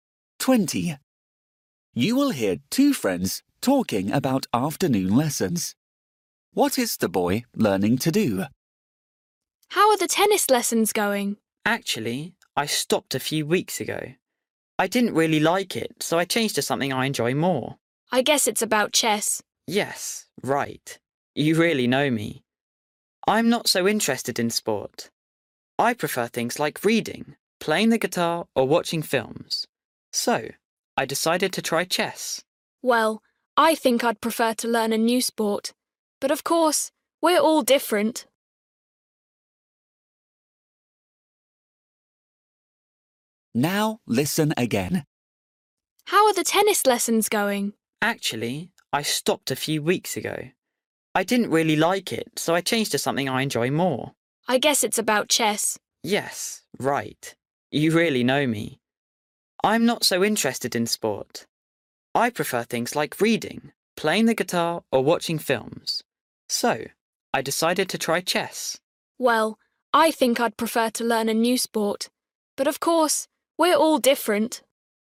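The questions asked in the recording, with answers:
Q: What is the boy learning to do?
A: to play chess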